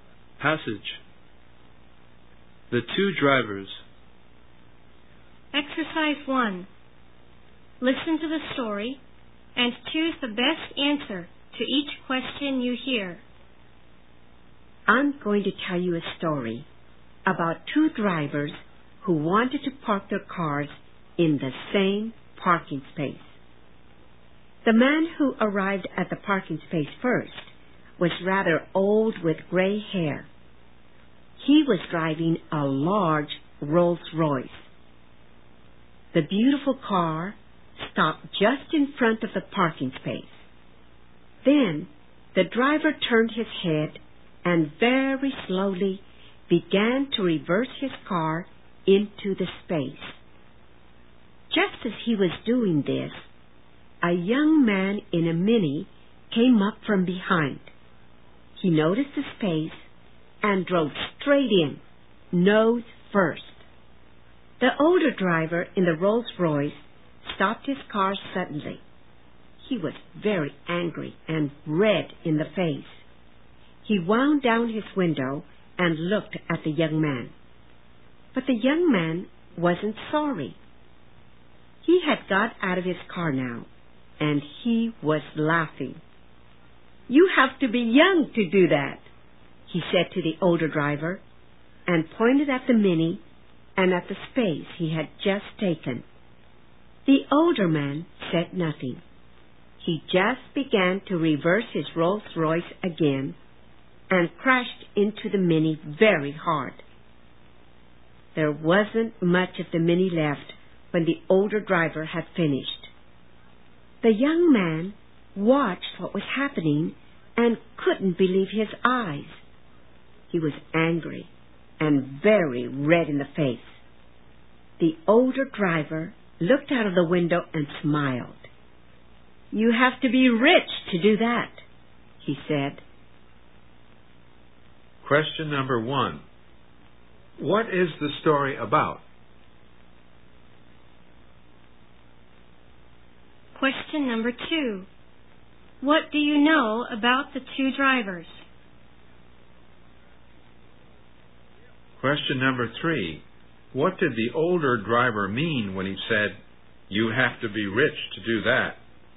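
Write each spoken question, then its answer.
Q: What is the story about?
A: Two drivers who wanted to park in the same parking space.

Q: What do you know about the two drivers?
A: One was an old gray-haired man in a Rolls Royce; the other was a young man in a Mini.

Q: What did the older driver mean when he said, "You have to be rich to do that"?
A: Only a rich man can afford to smash another car with his own expensive car.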